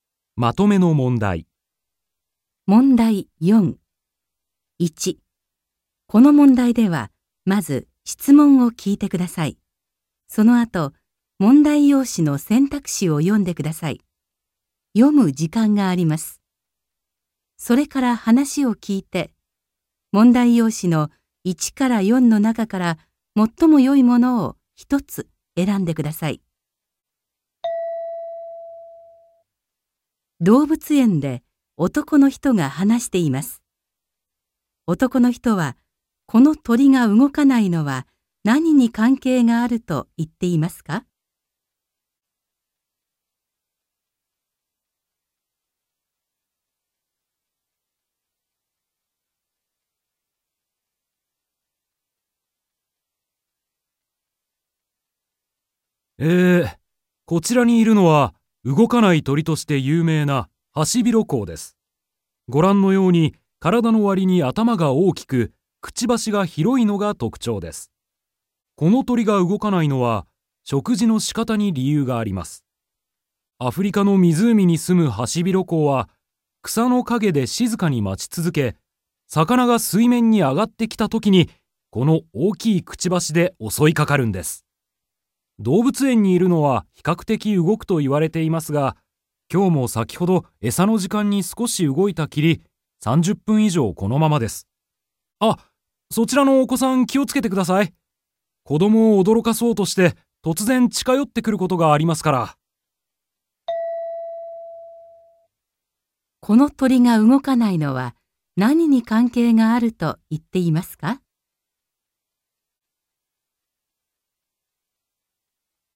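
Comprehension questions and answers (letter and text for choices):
1.この問題では、まず質問を聞いてください。 そのあと、問題用紙の選択肢を読んでください。読む時間があります。 それから話を聞いて、問題用紙の1から4の中から、最もよいものを一つ選んでください。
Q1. 男の人はこの鳥が動かないのは何に関係があると言っていますか。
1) からだおおきさ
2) 住んでいるところ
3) えさのとり方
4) 性格せいかく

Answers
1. 3) えさのとり方

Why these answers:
この鳥が動かないのは、食事のし方に理由があります。

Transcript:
1.この問題では、まず質問を聞いてください。
まず、文章を聞いてください。 それから、それに対する返事を聞いて、1から3の中から、最もよいものを一つ選んでください。
そのあと、問題用紙の選択肢を読んでください。 それから話を聞いて、問題用紙の1から4の中から、最もよいものを一つ選んでください。
2.この問題では、問題用紙に何も印刷されていません。
読む時間があります。
動物園で男の人が話しています。男の人はこの鳥が動かないのは何に関係があると言っていますか。
M: えー、こちらにいるのは、動かない鳥として有名なハシビロコウです。ご覧のように、体のわりに頭が大きく、くちばしが広いのが特徴です。アフリカの湖に住むハシビロコウは草の陰で静かに待ち続け、魚が水面に上がってきたときにこの大きいくちばしでおそいかかるんです。動物園にいるのは比較的動くと言われていますが、今日も先ほどえさの時間に少し動いたきり、30分以上このままです。

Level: N2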